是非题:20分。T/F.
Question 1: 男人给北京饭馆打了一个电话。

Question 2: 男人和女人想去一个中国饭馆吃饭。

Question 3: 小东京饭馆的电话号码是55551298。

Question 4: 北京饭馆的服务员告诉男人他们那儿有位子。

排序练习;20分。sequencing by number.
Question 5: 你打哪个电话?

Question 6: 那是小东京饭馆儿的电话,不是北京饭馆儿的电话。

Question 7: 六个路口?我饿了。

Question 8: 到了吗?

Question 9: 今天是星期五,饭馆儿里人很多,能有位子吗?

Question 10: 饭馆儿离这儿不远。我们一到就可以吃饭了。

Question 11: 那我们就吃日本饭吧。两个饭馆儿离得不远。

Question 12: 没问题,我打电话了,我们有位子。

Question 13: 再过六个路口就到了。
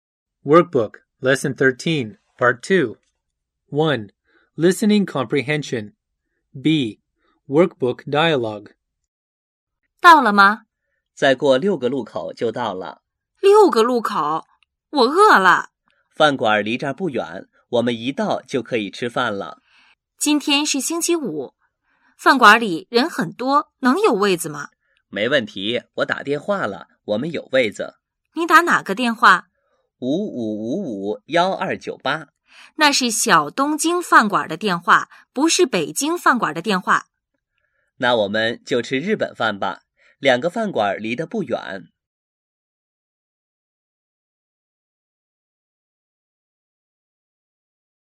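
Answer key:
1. F
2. T
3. T
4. F
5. 7
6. 9
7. 3
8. 1
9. 5
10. 4
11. 10
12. 6
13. 2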